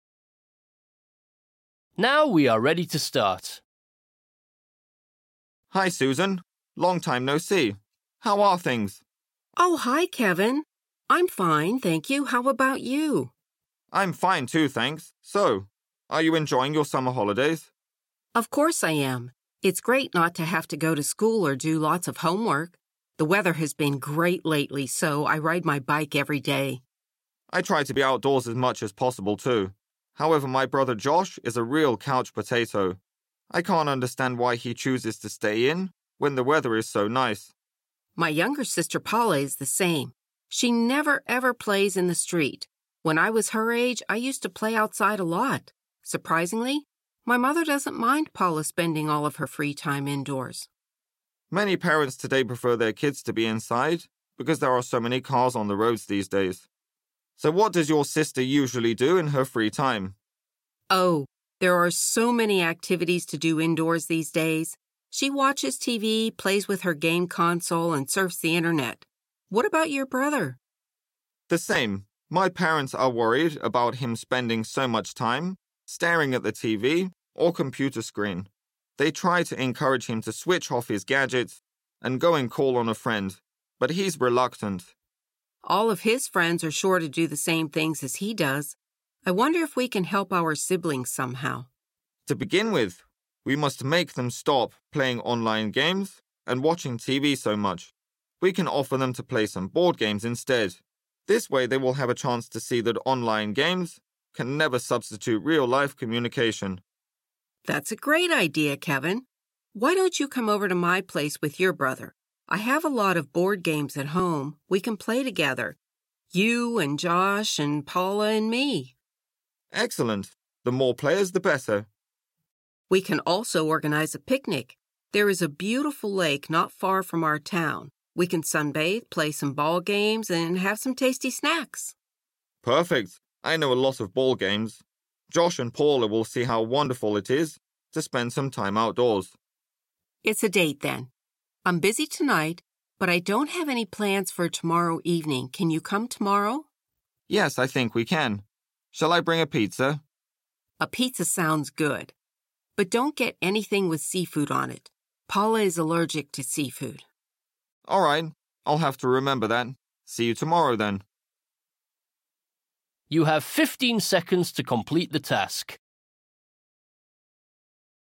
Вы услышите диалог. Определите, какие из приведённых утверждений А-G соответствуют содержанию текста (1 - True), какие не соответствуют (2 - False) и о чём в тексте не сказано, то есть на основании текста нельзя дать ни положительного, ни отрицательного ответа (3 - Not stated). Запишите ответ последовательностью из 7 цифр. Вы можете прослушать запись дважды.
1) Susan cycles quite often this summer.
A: True

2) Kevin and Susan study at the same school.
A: Not stated

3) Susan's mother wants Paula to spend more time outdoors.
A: False

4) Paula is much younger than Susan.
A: Not stated

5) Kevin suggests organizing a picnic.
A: False